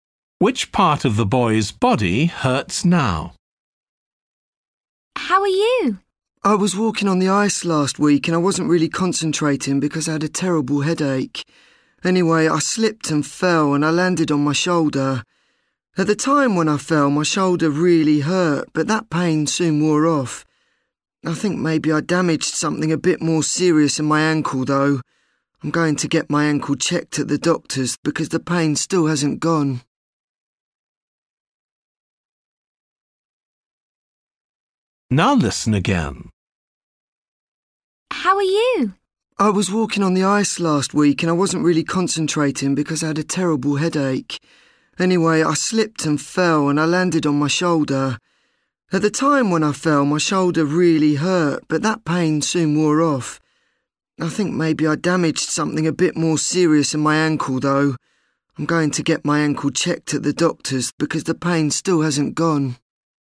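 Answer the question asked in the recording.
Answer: His ankle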